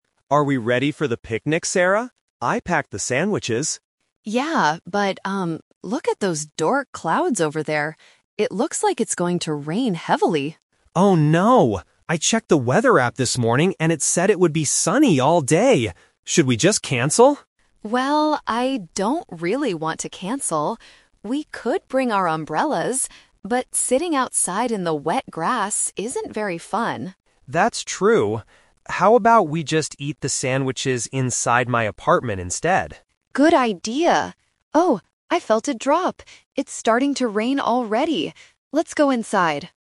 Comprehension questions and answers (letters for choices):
Read the questions below. Listen to the conversation between two friends and choose the correct answer (A, B, or C).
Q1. What did the weather app predict this morning?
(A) It would be sunny.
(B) It would be rainy.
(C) It would be windy.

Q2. Why do they decide NOT to use umbrellas?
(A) They don't have any umbrellas with them.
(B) Sitting outside in the rain is not enjoyable.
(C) The umbrellas are too small for both of them.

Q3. What do they finally decide to do?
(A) Go on the picnic with umbrellas.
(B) Cancel their lunch completely.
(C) Eat their food indoors.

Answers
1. A
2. B
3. C

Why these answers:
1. Mark clearly says the app "said it would be sunny all day".
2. Sarah says, "We could bring our umbrellas, but sitting outside in the wet grass isn't very fun."
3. Mark suggests, "How about we just eat the sandwiches inside my apartment instead?" and Sarah agrees.

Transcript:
Mark: Are we ready for the picnic, Sarah? I packed the sandwiches.
Sarah: Yeah, but, um... look at those dark clouds over there. It looks like it's going to rain heavily.
Mark: Oh no! I checked the weather app this morning and it said it would be sunny all day. Should we just cancel?
Sarah: Well, I don't really want to cancel. We could bring our umbrellas, but sitting outside in the wet grass isn't very fun.
Mark: That's true. How about we just eat the sandwiches inside my apartment instead?
Sarah: Good idea. Oh, I felt a drop! It's starting to rain already! Let's go inside.

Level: A2